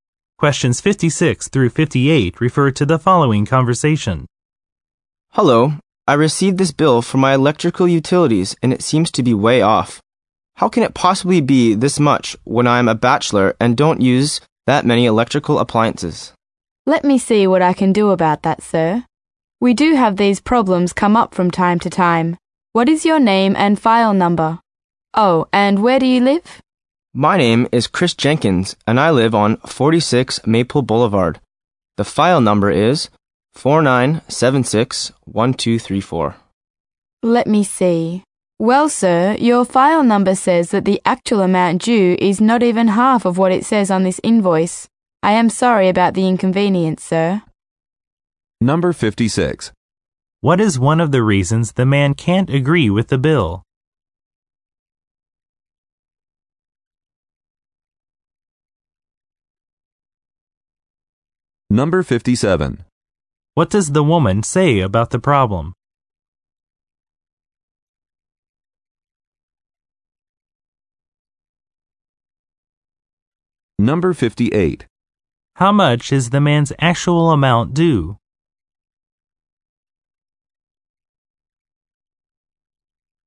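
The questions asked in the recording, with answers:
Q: What is one of the reasons the man can't agree with the bill?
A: He is a bachelor and doesn't use many electrical appliances

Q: What does the woman say about the problem?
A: Such problems come up from time to time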